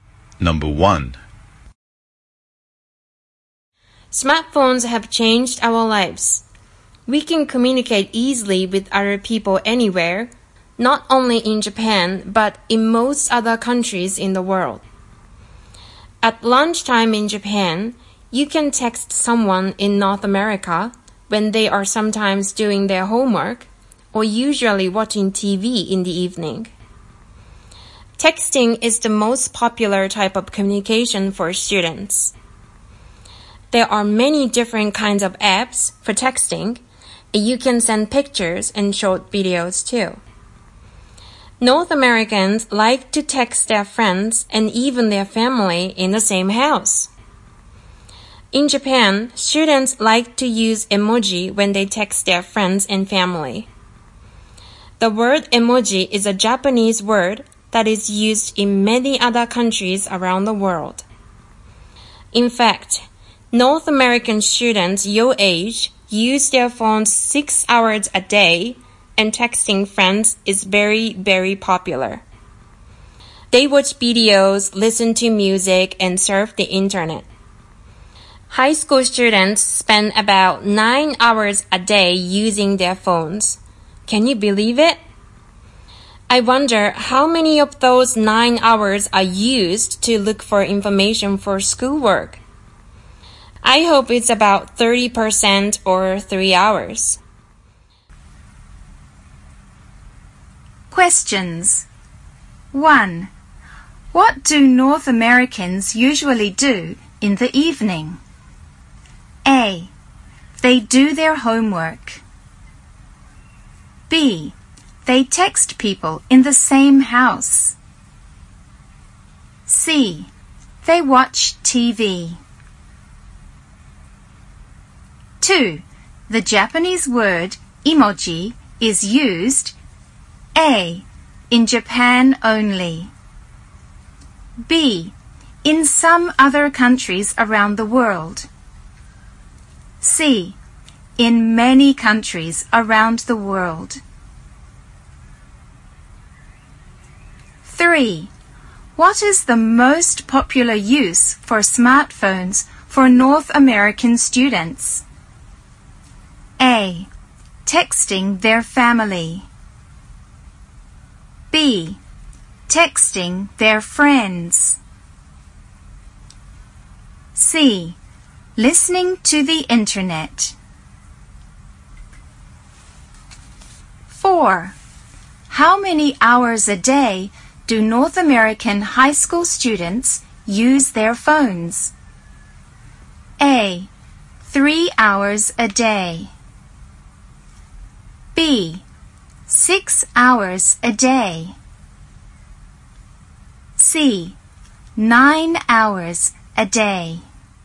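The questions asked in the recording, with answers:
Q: What do North Americans usually do in the evening?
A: C: They watch TV.

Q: The Japanese word emoji is used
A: C: in many countries around the world.

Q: What is the most popular use for smartphones for North American students?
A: B: Texting their friends.

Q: How many hours a day do North American high school students use their phones?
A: C: 9 hours a day.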